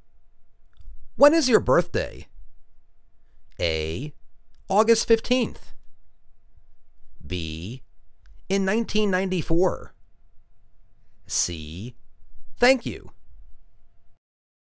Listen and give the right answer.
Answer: August 15th.